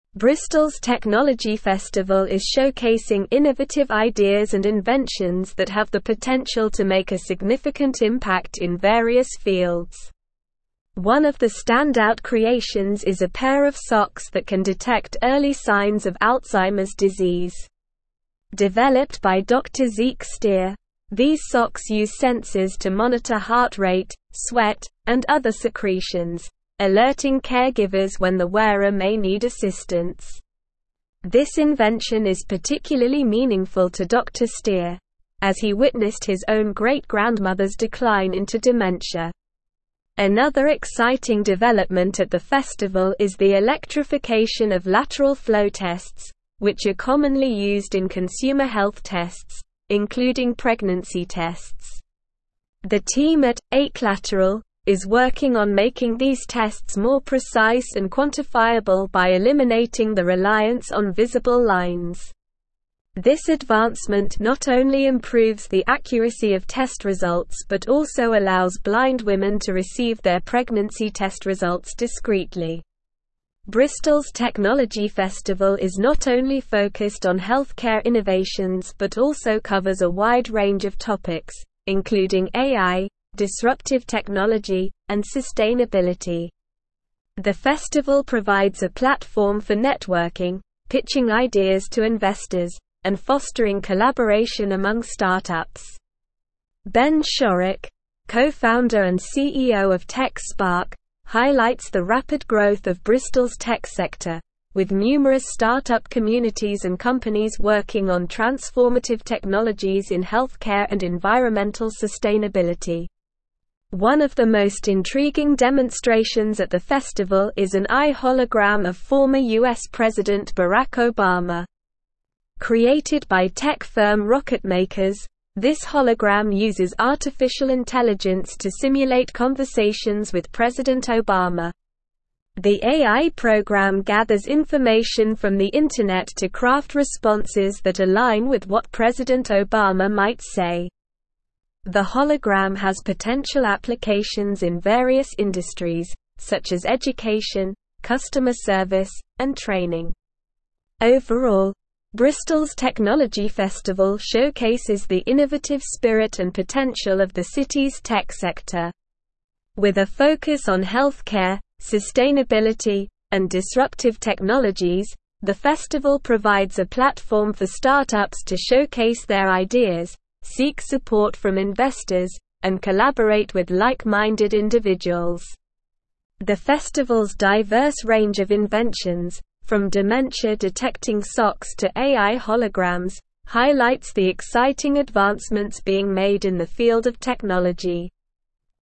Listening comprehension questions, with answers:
Listen and Fill in the Gaps:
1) Bristol's technology festival is showcasing (1)______ ideas and inventions that have the potential to make a significant impact in various fields.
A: innovative

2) One of the standout creations is a pair of socks that can detect (2)______ signs of Alzheimer's Disease.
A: early

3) Developed by Dr. Zeke Steer, these socks use sensors to (3)______ heart rate, sweat, and other secretions, alerting caregivers when the wearer may need assistance.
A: monitor

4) Another exciting development at the festival is the (4)______ of lateral flow tests, which are commonly used in consumer health tests, including pregnancy tests.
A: electrification

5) Bristol's technology festival is not only (5)______ on healthcare innovations but also (6)______ a wide range of topics, including AI, disruptive technology, and (7)______.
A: focused

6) Bristol's technology festival is not only (5)______ on healthcare innovations but also (6)______ a wide range of topics, including AI, disruptive technology, and (7)______.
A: covers

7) Bristol's technology festival is not only (5)______ on healthcare innovations but also (6)______ a wide range of topics, including AI, disruptive technology, and (7)______.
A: sustainability

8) The festival provides a platform for (8)______, pitching ideas to investors, and fostering collaboration among start-ups.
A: networking

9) Ben Shorrock, co-founder and CEO of (9)______, highlights the rapid growth of Bristol's tech sector, with numerous start-up communities and companies working on (10)______ technologies in healthcare and environmental sustainability.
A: TechSpark

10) Ben Shorrock, co-founder and CEO of (9)______, highlights the rapid growth of Bristol's tech sector, with numerous start-up communities and companies working on (10)______ technologies in healthcare and environmental sustainability.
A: transformative

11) One of the most intriguing (11)______ at the festival is an AI hologram of former US President Barack Obama.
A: demonstrations

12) Created by tech firm Rocketmakers, this hologram uses artificial intelligence to simulate (12)______ with President Obama.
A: conversations

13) Overall, Bristol's technology festival showcases the innovative (13)______ and potential of the city's tech sector.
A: spirit

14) With a (14)______ on (15)______, sustainability, and disruptive technologies, the festival provides a platform for start-ups to showcase their ideas, seek support from investors, and (16)______ with like-minded individuals.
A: focus

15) With a (14)______ on (15)______, sustainability, and disruptive technologies, the festival provides a platform for start-ups to showcase their ideas, seek support from investors, and (16)______ with like-minded individuals.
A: healthcare

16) With a (14)______ on (15)______, sustainability, and disruptive technologies, the festival provides a platform for start-ups to showcase their ideas, seek support from investors, and (16)______ with like-minded individuals.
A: collaborate

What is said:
Bristol's technology festival is showcasing innovative ideas and inventions that have the potential to make a significant impact in various fields. One of the standout creations is a pair of socks that can detect early signs of Alzheimer's Disease. Developed by Dr. Zeke Steer, these socks use sensors to monitor heart rate, sweat, and other secretions, alerting caregivers when the wearer may need assistance. This invention is particularly meaningful to Dr. Steer, as he witnessed his own great-grandmother's decline into dementia.
Another exciting development at the festival is the electrification of lateral flow tests, which are commonly used in consumer health tests, including pregnancy tests. The team at 'eclateral' is working on making these tests more precise and quantifiable by eliminating the reliance on visible lines. This advancement not only improves the accuracy of test results but also allows blind women to receive their pregnancy test results discreetly.
Bristol's technology festival is not only focused on healthcare innovations but also covers a wide range of topics, including AI, disruptive technology, and sustainability. The festival provides a platform for networking, pitching ideas to investors, and fostering collaboration among start-ups. Ben Shorrock, co-founder and CEO of TechSpark, highlights the rapid growth of Bristol's tech sector, with numerous start-up communities and companies working on transformative technologies in healthcare and environmental sustainability.
One of the most intriguing demonstrations at the festival is an AI hologram of former US President Barack Obama. Created by tech firm Rocketmakers, this hologram uses artificial intelligence to simulate conversations with President Obama. The AI program gathers information from the internet to craft responses that align with what President Obama might say. The hologram has potential applications in various industries, such as education, customer service, and training.
Overall, Bristol's technology festival showcases the innovative spirit and potential of the city's tech sector. With a focus on healthcare, sustainability, and disruptive technologies, the festival provides a platform for start-ups to showcase their ideas, seek support from investors, and collaborate with like-minded individuals. The festival's diverse range of inventions, from dementia-detecting socks to AI holograms, highlights the exciting advancements being made in the field of technology.

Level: Level 4